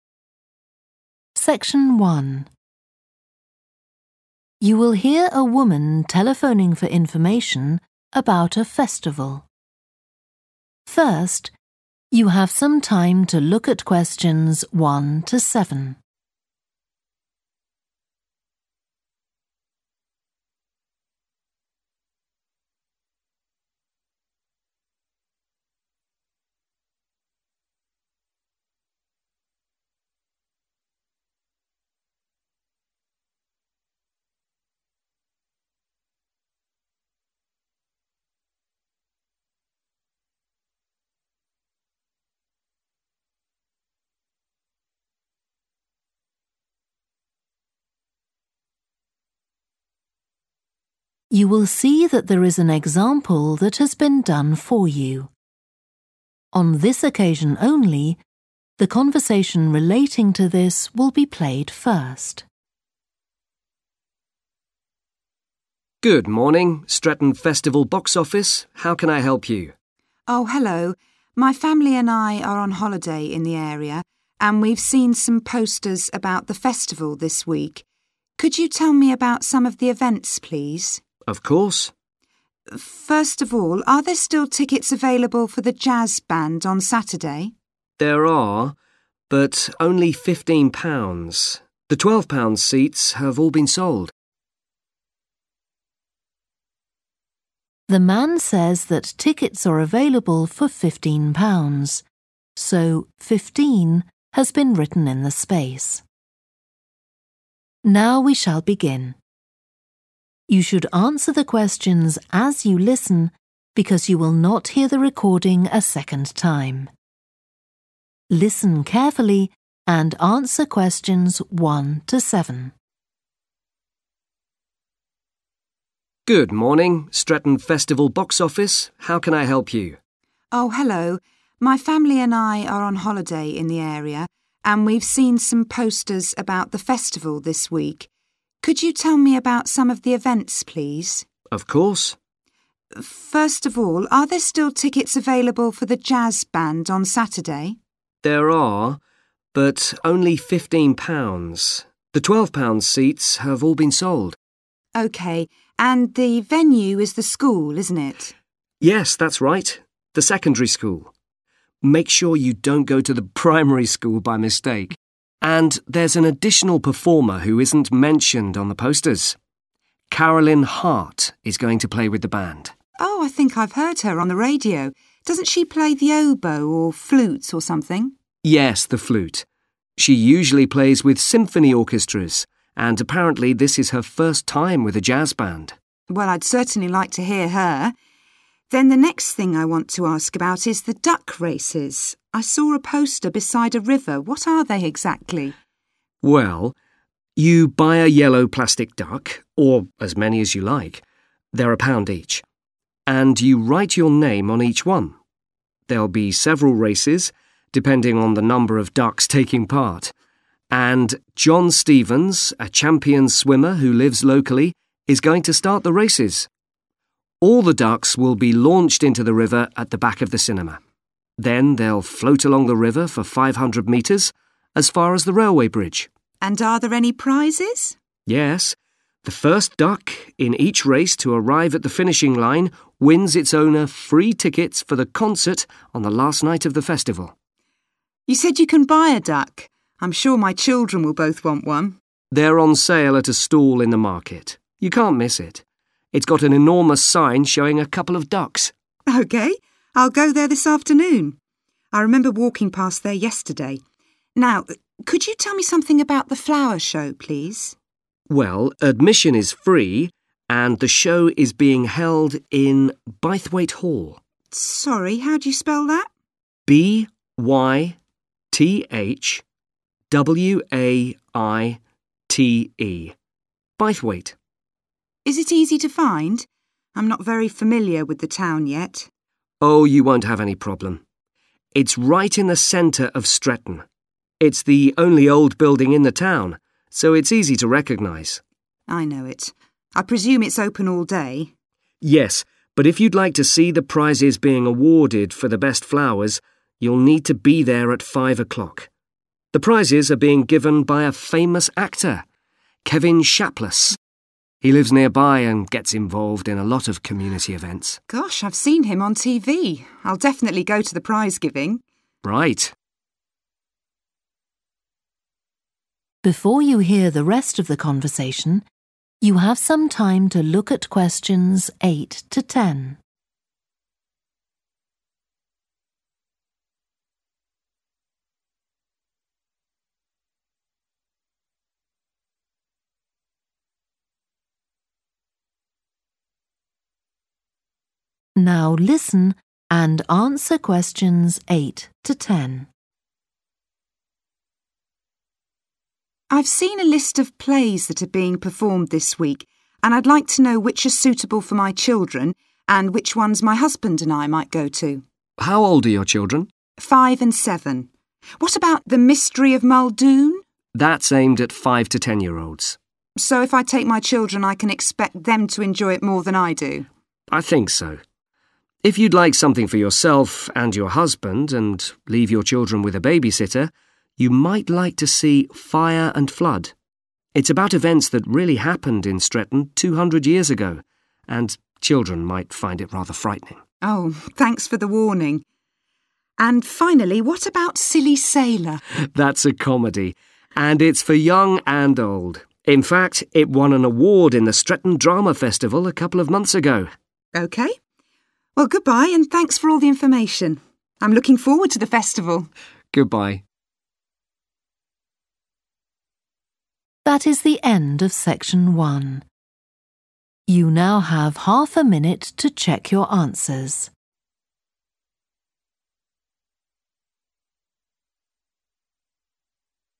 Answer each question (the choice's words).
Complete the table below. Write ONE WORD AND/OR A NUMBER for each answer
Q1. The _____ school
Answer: secondary

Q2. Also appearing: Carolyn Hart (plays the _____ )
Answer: flute

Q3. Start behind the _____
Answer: cinema

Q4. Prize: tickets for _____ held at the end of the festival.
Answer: concert

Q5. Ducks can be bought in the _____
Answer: market

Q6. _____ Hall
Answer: Bythwaite

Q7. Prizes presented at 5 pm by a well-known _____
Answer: actor

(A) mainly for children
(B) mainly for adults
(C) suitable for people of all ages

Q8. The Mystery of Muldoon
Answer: mainly for children

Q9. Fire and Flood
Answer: mainly for adults

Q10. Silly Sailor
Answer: suitable for people of all ages

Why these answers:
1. The transcript talks about the name of the school being the secondary school. It is referring to the type of school being talked about in the conversation. Answer Explanation: The answer points to a type of school known as a secondary school. You are understanding that the event is taking place at a specific type of educational institution. Reason For Correctness: The correct answer matches with the information in the excerpt where the specific school mentioned is referred to as 'secondary school'. This shows that the event is happening at a school that is not primary but secondary in education levels.
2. The transcript mentions a musical instrument called the flute. Answer Explanation: The answer 'flute' refers to a type of musical instrument. Reason For Correctness: The correct answer matches the musical instrument mentioned in the excerpt, which is the flute. In this context, the answer is correct because it aligns with the topic of the conversation and provides the missing information for the input field in the table related to the musician Carolyn Hart's instrument ('... Also appearing: Carolyn Hart (plays the flute) ...').
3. The transcript mentions that all the ducks will be released into the river located at the back of the cinema. Answer Explanation: The answer 'cinema' refers to a place where films are shown on a big screen. It is a type of entertainment venue where people watch movies. Reason For Correctness: The correct answer is 'cinema' because it fits the context of the excerpt where the ducks are being launched into the river behind a place associated with showing movies, which is a cinema. This is supported by the relationship between launching ducks and the location provided in the event description.
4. The transcript talks about a race where the first duck to reach the finish line wins its owner free tickets for a music performance at the end of the festival. Answer Explanation: The answer 'concert' refers to a music show or performance that the winner of the duck race receives tickets for. Reason For Correctness: The correct answer is 'concert' because it matches the type of event the winner gets tickets for, as mentioned in the excerpt about winning free tickets for a concert on the last night of the festival.
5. The transcript says that the tickets are being sold at a table in the market, likely a designated area for buying and selling goods. Answer Explanation: The answer 'market' refers to a place where goods are bought and sold by different vendors, often set up in a designated area. Reason For Correctness: The correct answer is 'market' because it aligns with the concept of goods being sold at a place where various vendors gather to sell their products, as described in the excerpt about tickets being sold at a stall in the market.
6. The transcript mentions that there is no cost to enter, and the event is happening at Bythwaite Hall. Answer Explanation: The answer 'Bythwaite' is the name of the hall where the flower show is taking place. Reason For Correctness: The correct answer matches the location mentioned in the excerpt, indicating that the flower show is indeed held at Bythwaite Hall. This is supported by the information that admission is free, aligning with the typical practice of holding free events at venues like halls.
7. The transcript says that the prizes are being given by a famous actor named Kevin Shapless. This means a person who acts in movies or plays is presenting the prizes. Answer Explanation: The answer is 'actor'. This means a person who performs in front of an audience, like in films or theater. Reason For Correctness: The correct answer is 'actor' because the excerpt mentions that the prizes at the flower show will be presented by a well-known actor. This fits with what we need for the notes in the table.
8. The transcript says that the play is meant for children between the ages of five and ten. Answer Explanation: The answer indicates that the play 'The Mystery of Muldoon' is mainly suitable for children. Reason For Correctness: The correct answer is 'A' (mainly for children) because the excerpt explicitly states that the play is aimed at five to ten-year-olds, suggesting it is intended for a younger audience.
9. The transcript is suggesting that if you want to go to a play with your husband and not bring your children, you may enjoy watching 'Fire and Flood'. Answer Explanation: The answer 'B' means that 'Fire and Flood' is mainly suitable for adults. Reason For Correctness: The correct answer is 'B' because the excerpt implies that it's a good choice for adults who may want to have a night out without their children. This suggests that the play is likely more catered towards adult themes and audience preferences.
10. The transcript says that "Silly Sailor" is a comedy. It also says that the play is for "young and old." Answer Explanation: The answer says that "Silly Sailor" is suitable for people of all ages. Reason For Correctness: The correct answer is "C" because the excerpt says that the play is for "young and old." This means it's suitable for both children and adults, making it suitable for everyone.

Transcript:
ROB: Good morning. Stretton Festival box office. How can I help you?
MELANIE: Oh, hello. My family and I are on holiday on the area, and we've seen some posters about the festival this week. Could you tell me about some of the events, please?
ROB: Of course.
MELANIE: First of all, are there still tickets available for the jazz band on Saturday?
ROB: There are, but only £15. The £12 seats have all been sold.
MELANIE: OK. And the venue is the school, isn't it?
ROB: Yes, that's right, the secondary school. Make sure you don't go to the primary school by mistake! And there's an additional performer who isn't mentioned on the posters – Carolyn Hart is going to play with the band.
MELANIE: Oh, I think I've heard her on the radio. Doesn't she play the oboe, or flute or something?
ROB: Yes the flute. She usually plays with symphony orchestras, and apparently this is her first time with a jazz band.
MELANIE: Well, I'd certainly like to hear her. Then the next thing I want to ask about is the duck races – I saw a poster beside a river. What are they, exactly?
ROB: Well, you buy a yellow plastic duck – or as many as you like – they're a pound each. And you write your name on each one. There'll be several races, depending on the number of ducks taking part. And John Stevens, a champion swimmer who lives locally, is going to start the races. All the ducks will be launched into the river at the back of the cinema, then they'll float along the river for 500 metres, as far as the railway bridge.
MELANIE: And are there any prizes?
ROB: Yes, the first duck in each race to arrive at the finishing line wins its owner free tickets for the concert on the last night of the festival.
MELANIE: You said you can buy a duck? I'm sure my children will both want one.
ROB: They're on sale at a stall in the market. You can't miss it – it's got an enormous sign showing a couple of ducks.
MELANIE: OK. I'll go there this afternoon. I remember walking past there yesterday. Now could you tell me something about the flower show, please?
ROB: Well, admission is free, and the show is being held in Bythwaite Hall.
MELANIE: Sorry, how do you spell that?
ROB: B-Y-T-H-W-A-I-T-E. Bythwaite.
MELANIE: Is it easy to find? I'm no very familiar with the town yet.
ROB: Oh, you won't have any problem. It's right in the centre of Stretton. It's the only old building in the town, so it's easy to recognise.
MELANIE: I know it. I presume it's open all day.
ROB: Yes, but if you'd like to see the prizes being awarded for the best flowers, you'll need to be there at 5 o'clock. The prizes are being given by a famous actor, Kevin Shapless. He lives nearby and gets involved in a lot of community events.
MELANIE: Gosh, I've seen him on TV. I'll definitely go to the prize-giving.
ROB: Right.
MELANIE: I've seen a list of plays that are being performed this week, and I'd like to know which are suitable for my children, and which ones my husband and I might go to.
ROB: How old are your children?
MELANIE: Five and seven. What about 'The Mystery of Muldoon'?
ROB: That's aimed at five to ten-year-olds.
MELANIE: So if I take my children, I can expect them to enjoy it more than I do?
ROB: I think so. If you'd like something for yourself and your husband and leave your children with a babysitter, you might like to see 'Fire and Flood' – it's about events that really happened in Stretton two hundred years ago, and children might find it rather frightening.
MELANIE: Oh, thanks for the warning. And finally, what about 'Silly Sailor'?
ROB: That's a comedy, and it's for young and old. In fact, it won an award in the Stretton Drama Festival a couple of months ago.
MELANIE: OK. Well, goodbye, and thanks for all the information. I'm looking forward to the festival!
ROB: Goodbye.